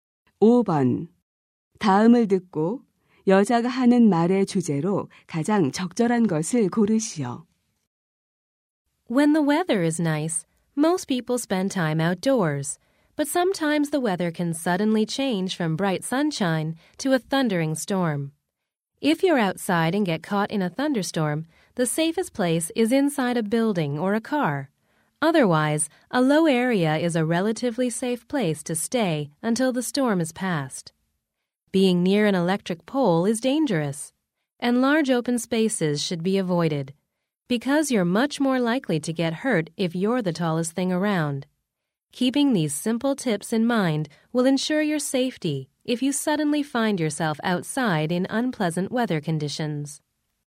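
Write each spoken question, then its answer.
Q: 다음을 듣고 여자가 하는 말의 주제로 가장 적절한 것을 고르시오.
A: 야외에서 뇌우를 만났을 때의 안전 수칙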